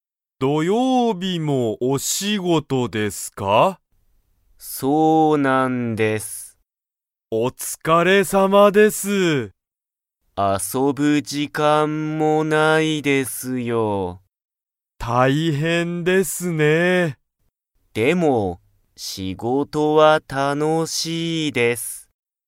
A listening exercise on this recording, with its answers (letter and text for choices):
Comprehension Quiz (Skip if you don't understand the conversation yet)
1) 後藤(ごとう)さんは、遊あそぶ時間じかんがありますか?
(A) はい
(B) いいえ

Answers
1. (B) いいえ

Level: Level 1